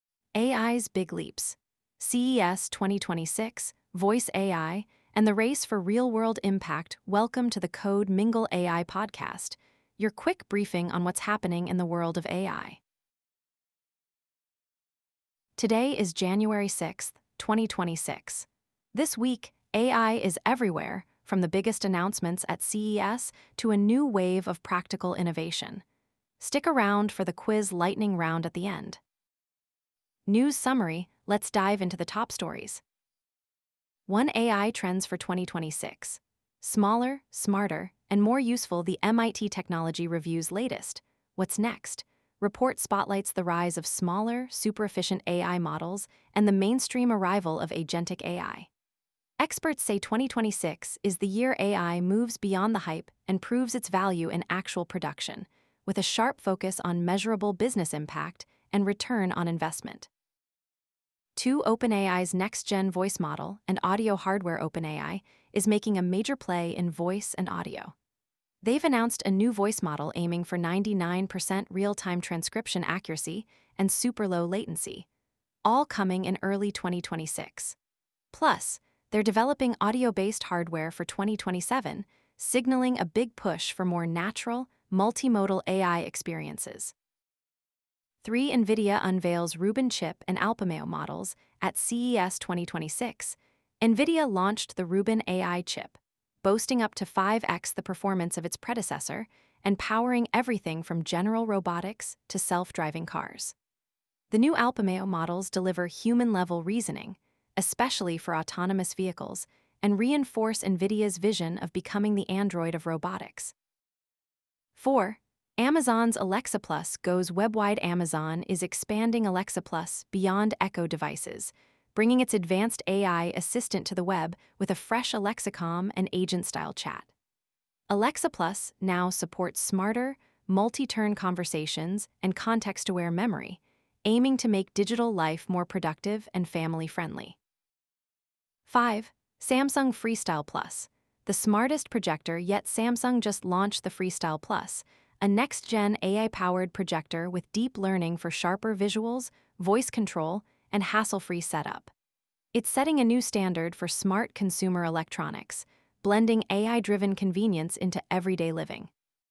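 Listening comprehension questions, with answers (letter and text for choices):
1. What key trend for AI in 2026 is highlighted by the MIT Technology Review?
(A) Focus on larger, more complex models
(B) Rise of smaller, efficient models and agentic AI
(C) Decline in AI-driven business outcomes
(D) Shift to purely speculative prototypes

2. What is a major technical breakthrough announced by Nvidia at CES 2026?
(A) A new cloud computing platform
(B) Rubin AI chip architecture for autonomous vehicles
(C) A voice model for real-time transcription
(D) A consumer smartphone with built-in AI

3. What performance improvement does Nvidia's Rubin chip offer over previous generations?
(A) 2x FLOPS improvement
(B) 3x FLOPS improvement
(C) 5x FLOPS improvement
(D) 10x FLOPS improvement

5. How is the AI industry shifting according to the executive summary?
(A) From practical deployments to speculative hype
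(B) From consumer devices to enterprise-only solutions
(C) From hype to pragmatic deployments with demand for ROI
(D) From partnerships to isolated development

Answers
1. (B) Rise of smaller, efficient models and agentic AI
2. (B) Rubin AI chip architecture for autonomous vehicles
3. (C) 5x FLOPS improvement
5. (C) From hype to pragmatic deployments with demand for ROI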